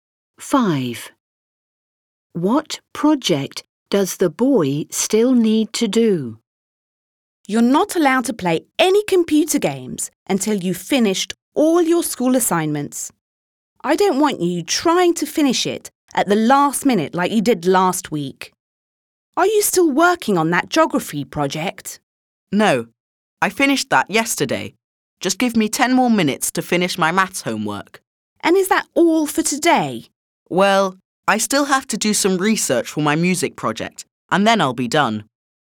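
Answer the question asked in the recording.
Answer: His music project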